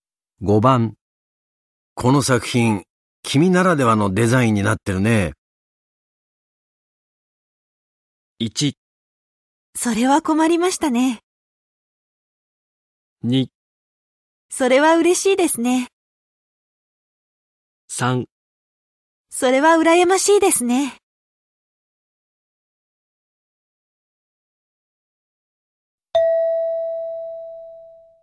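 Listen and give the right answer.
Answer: 2: それは嬉しいですね。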